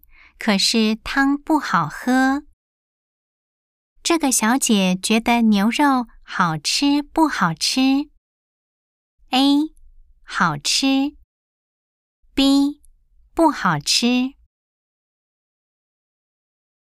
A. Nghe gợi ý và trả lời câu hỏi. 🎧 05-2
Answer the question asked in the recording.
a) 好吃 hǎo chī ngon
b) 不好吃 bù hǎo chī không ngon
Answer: a) 好吃 hǎo chī ngon